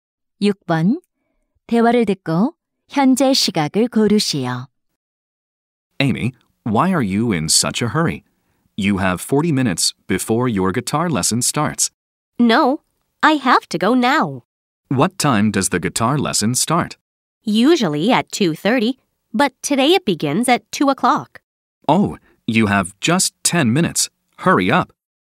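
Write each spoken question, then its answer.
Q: 대화를 듣고 현재 시각을 고르시오.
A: 1시 50분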